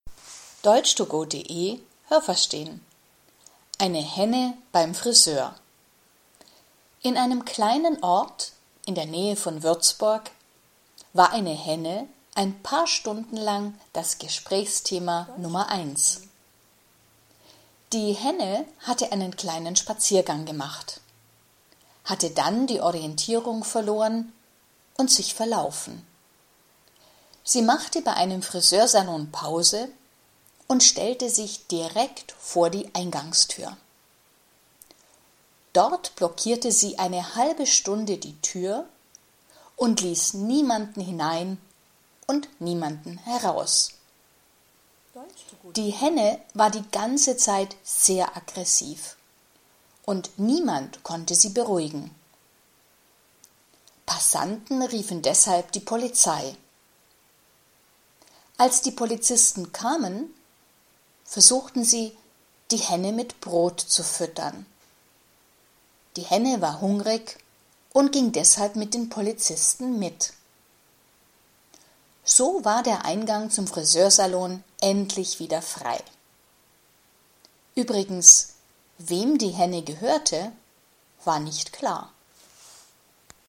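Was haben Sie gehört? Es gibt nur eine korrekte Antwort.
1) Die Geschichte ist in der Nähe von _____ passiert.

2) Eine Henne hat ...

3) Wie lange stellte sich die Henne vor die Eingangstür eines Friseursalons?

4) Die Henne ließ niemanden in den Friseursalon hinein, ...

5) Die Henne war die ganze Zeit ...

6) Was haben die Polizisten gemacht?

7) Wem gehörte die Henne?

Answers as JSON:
{"1": "Würzburg", "2": "sich verlaufen", "3": "eine halbe Stunde", "4": "und niemanden heraus", "5": "sehr aggressiv", "6": "Sie versuchten, die Henne mit Brot zu füttern.", "7": "Das war nicht klar."}

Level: A (einfach)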